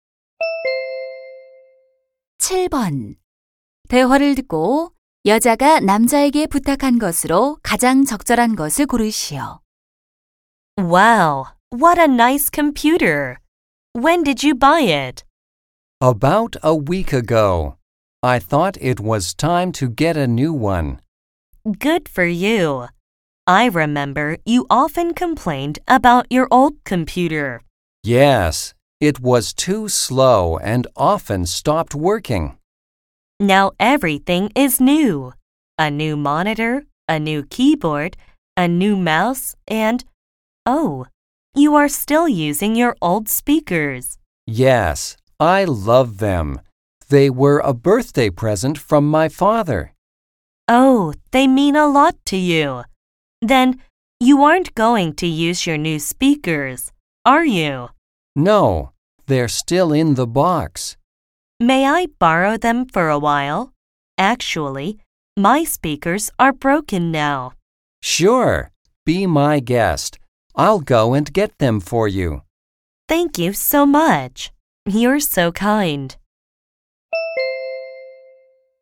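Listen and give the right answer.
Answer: 새 스피커 빌려주기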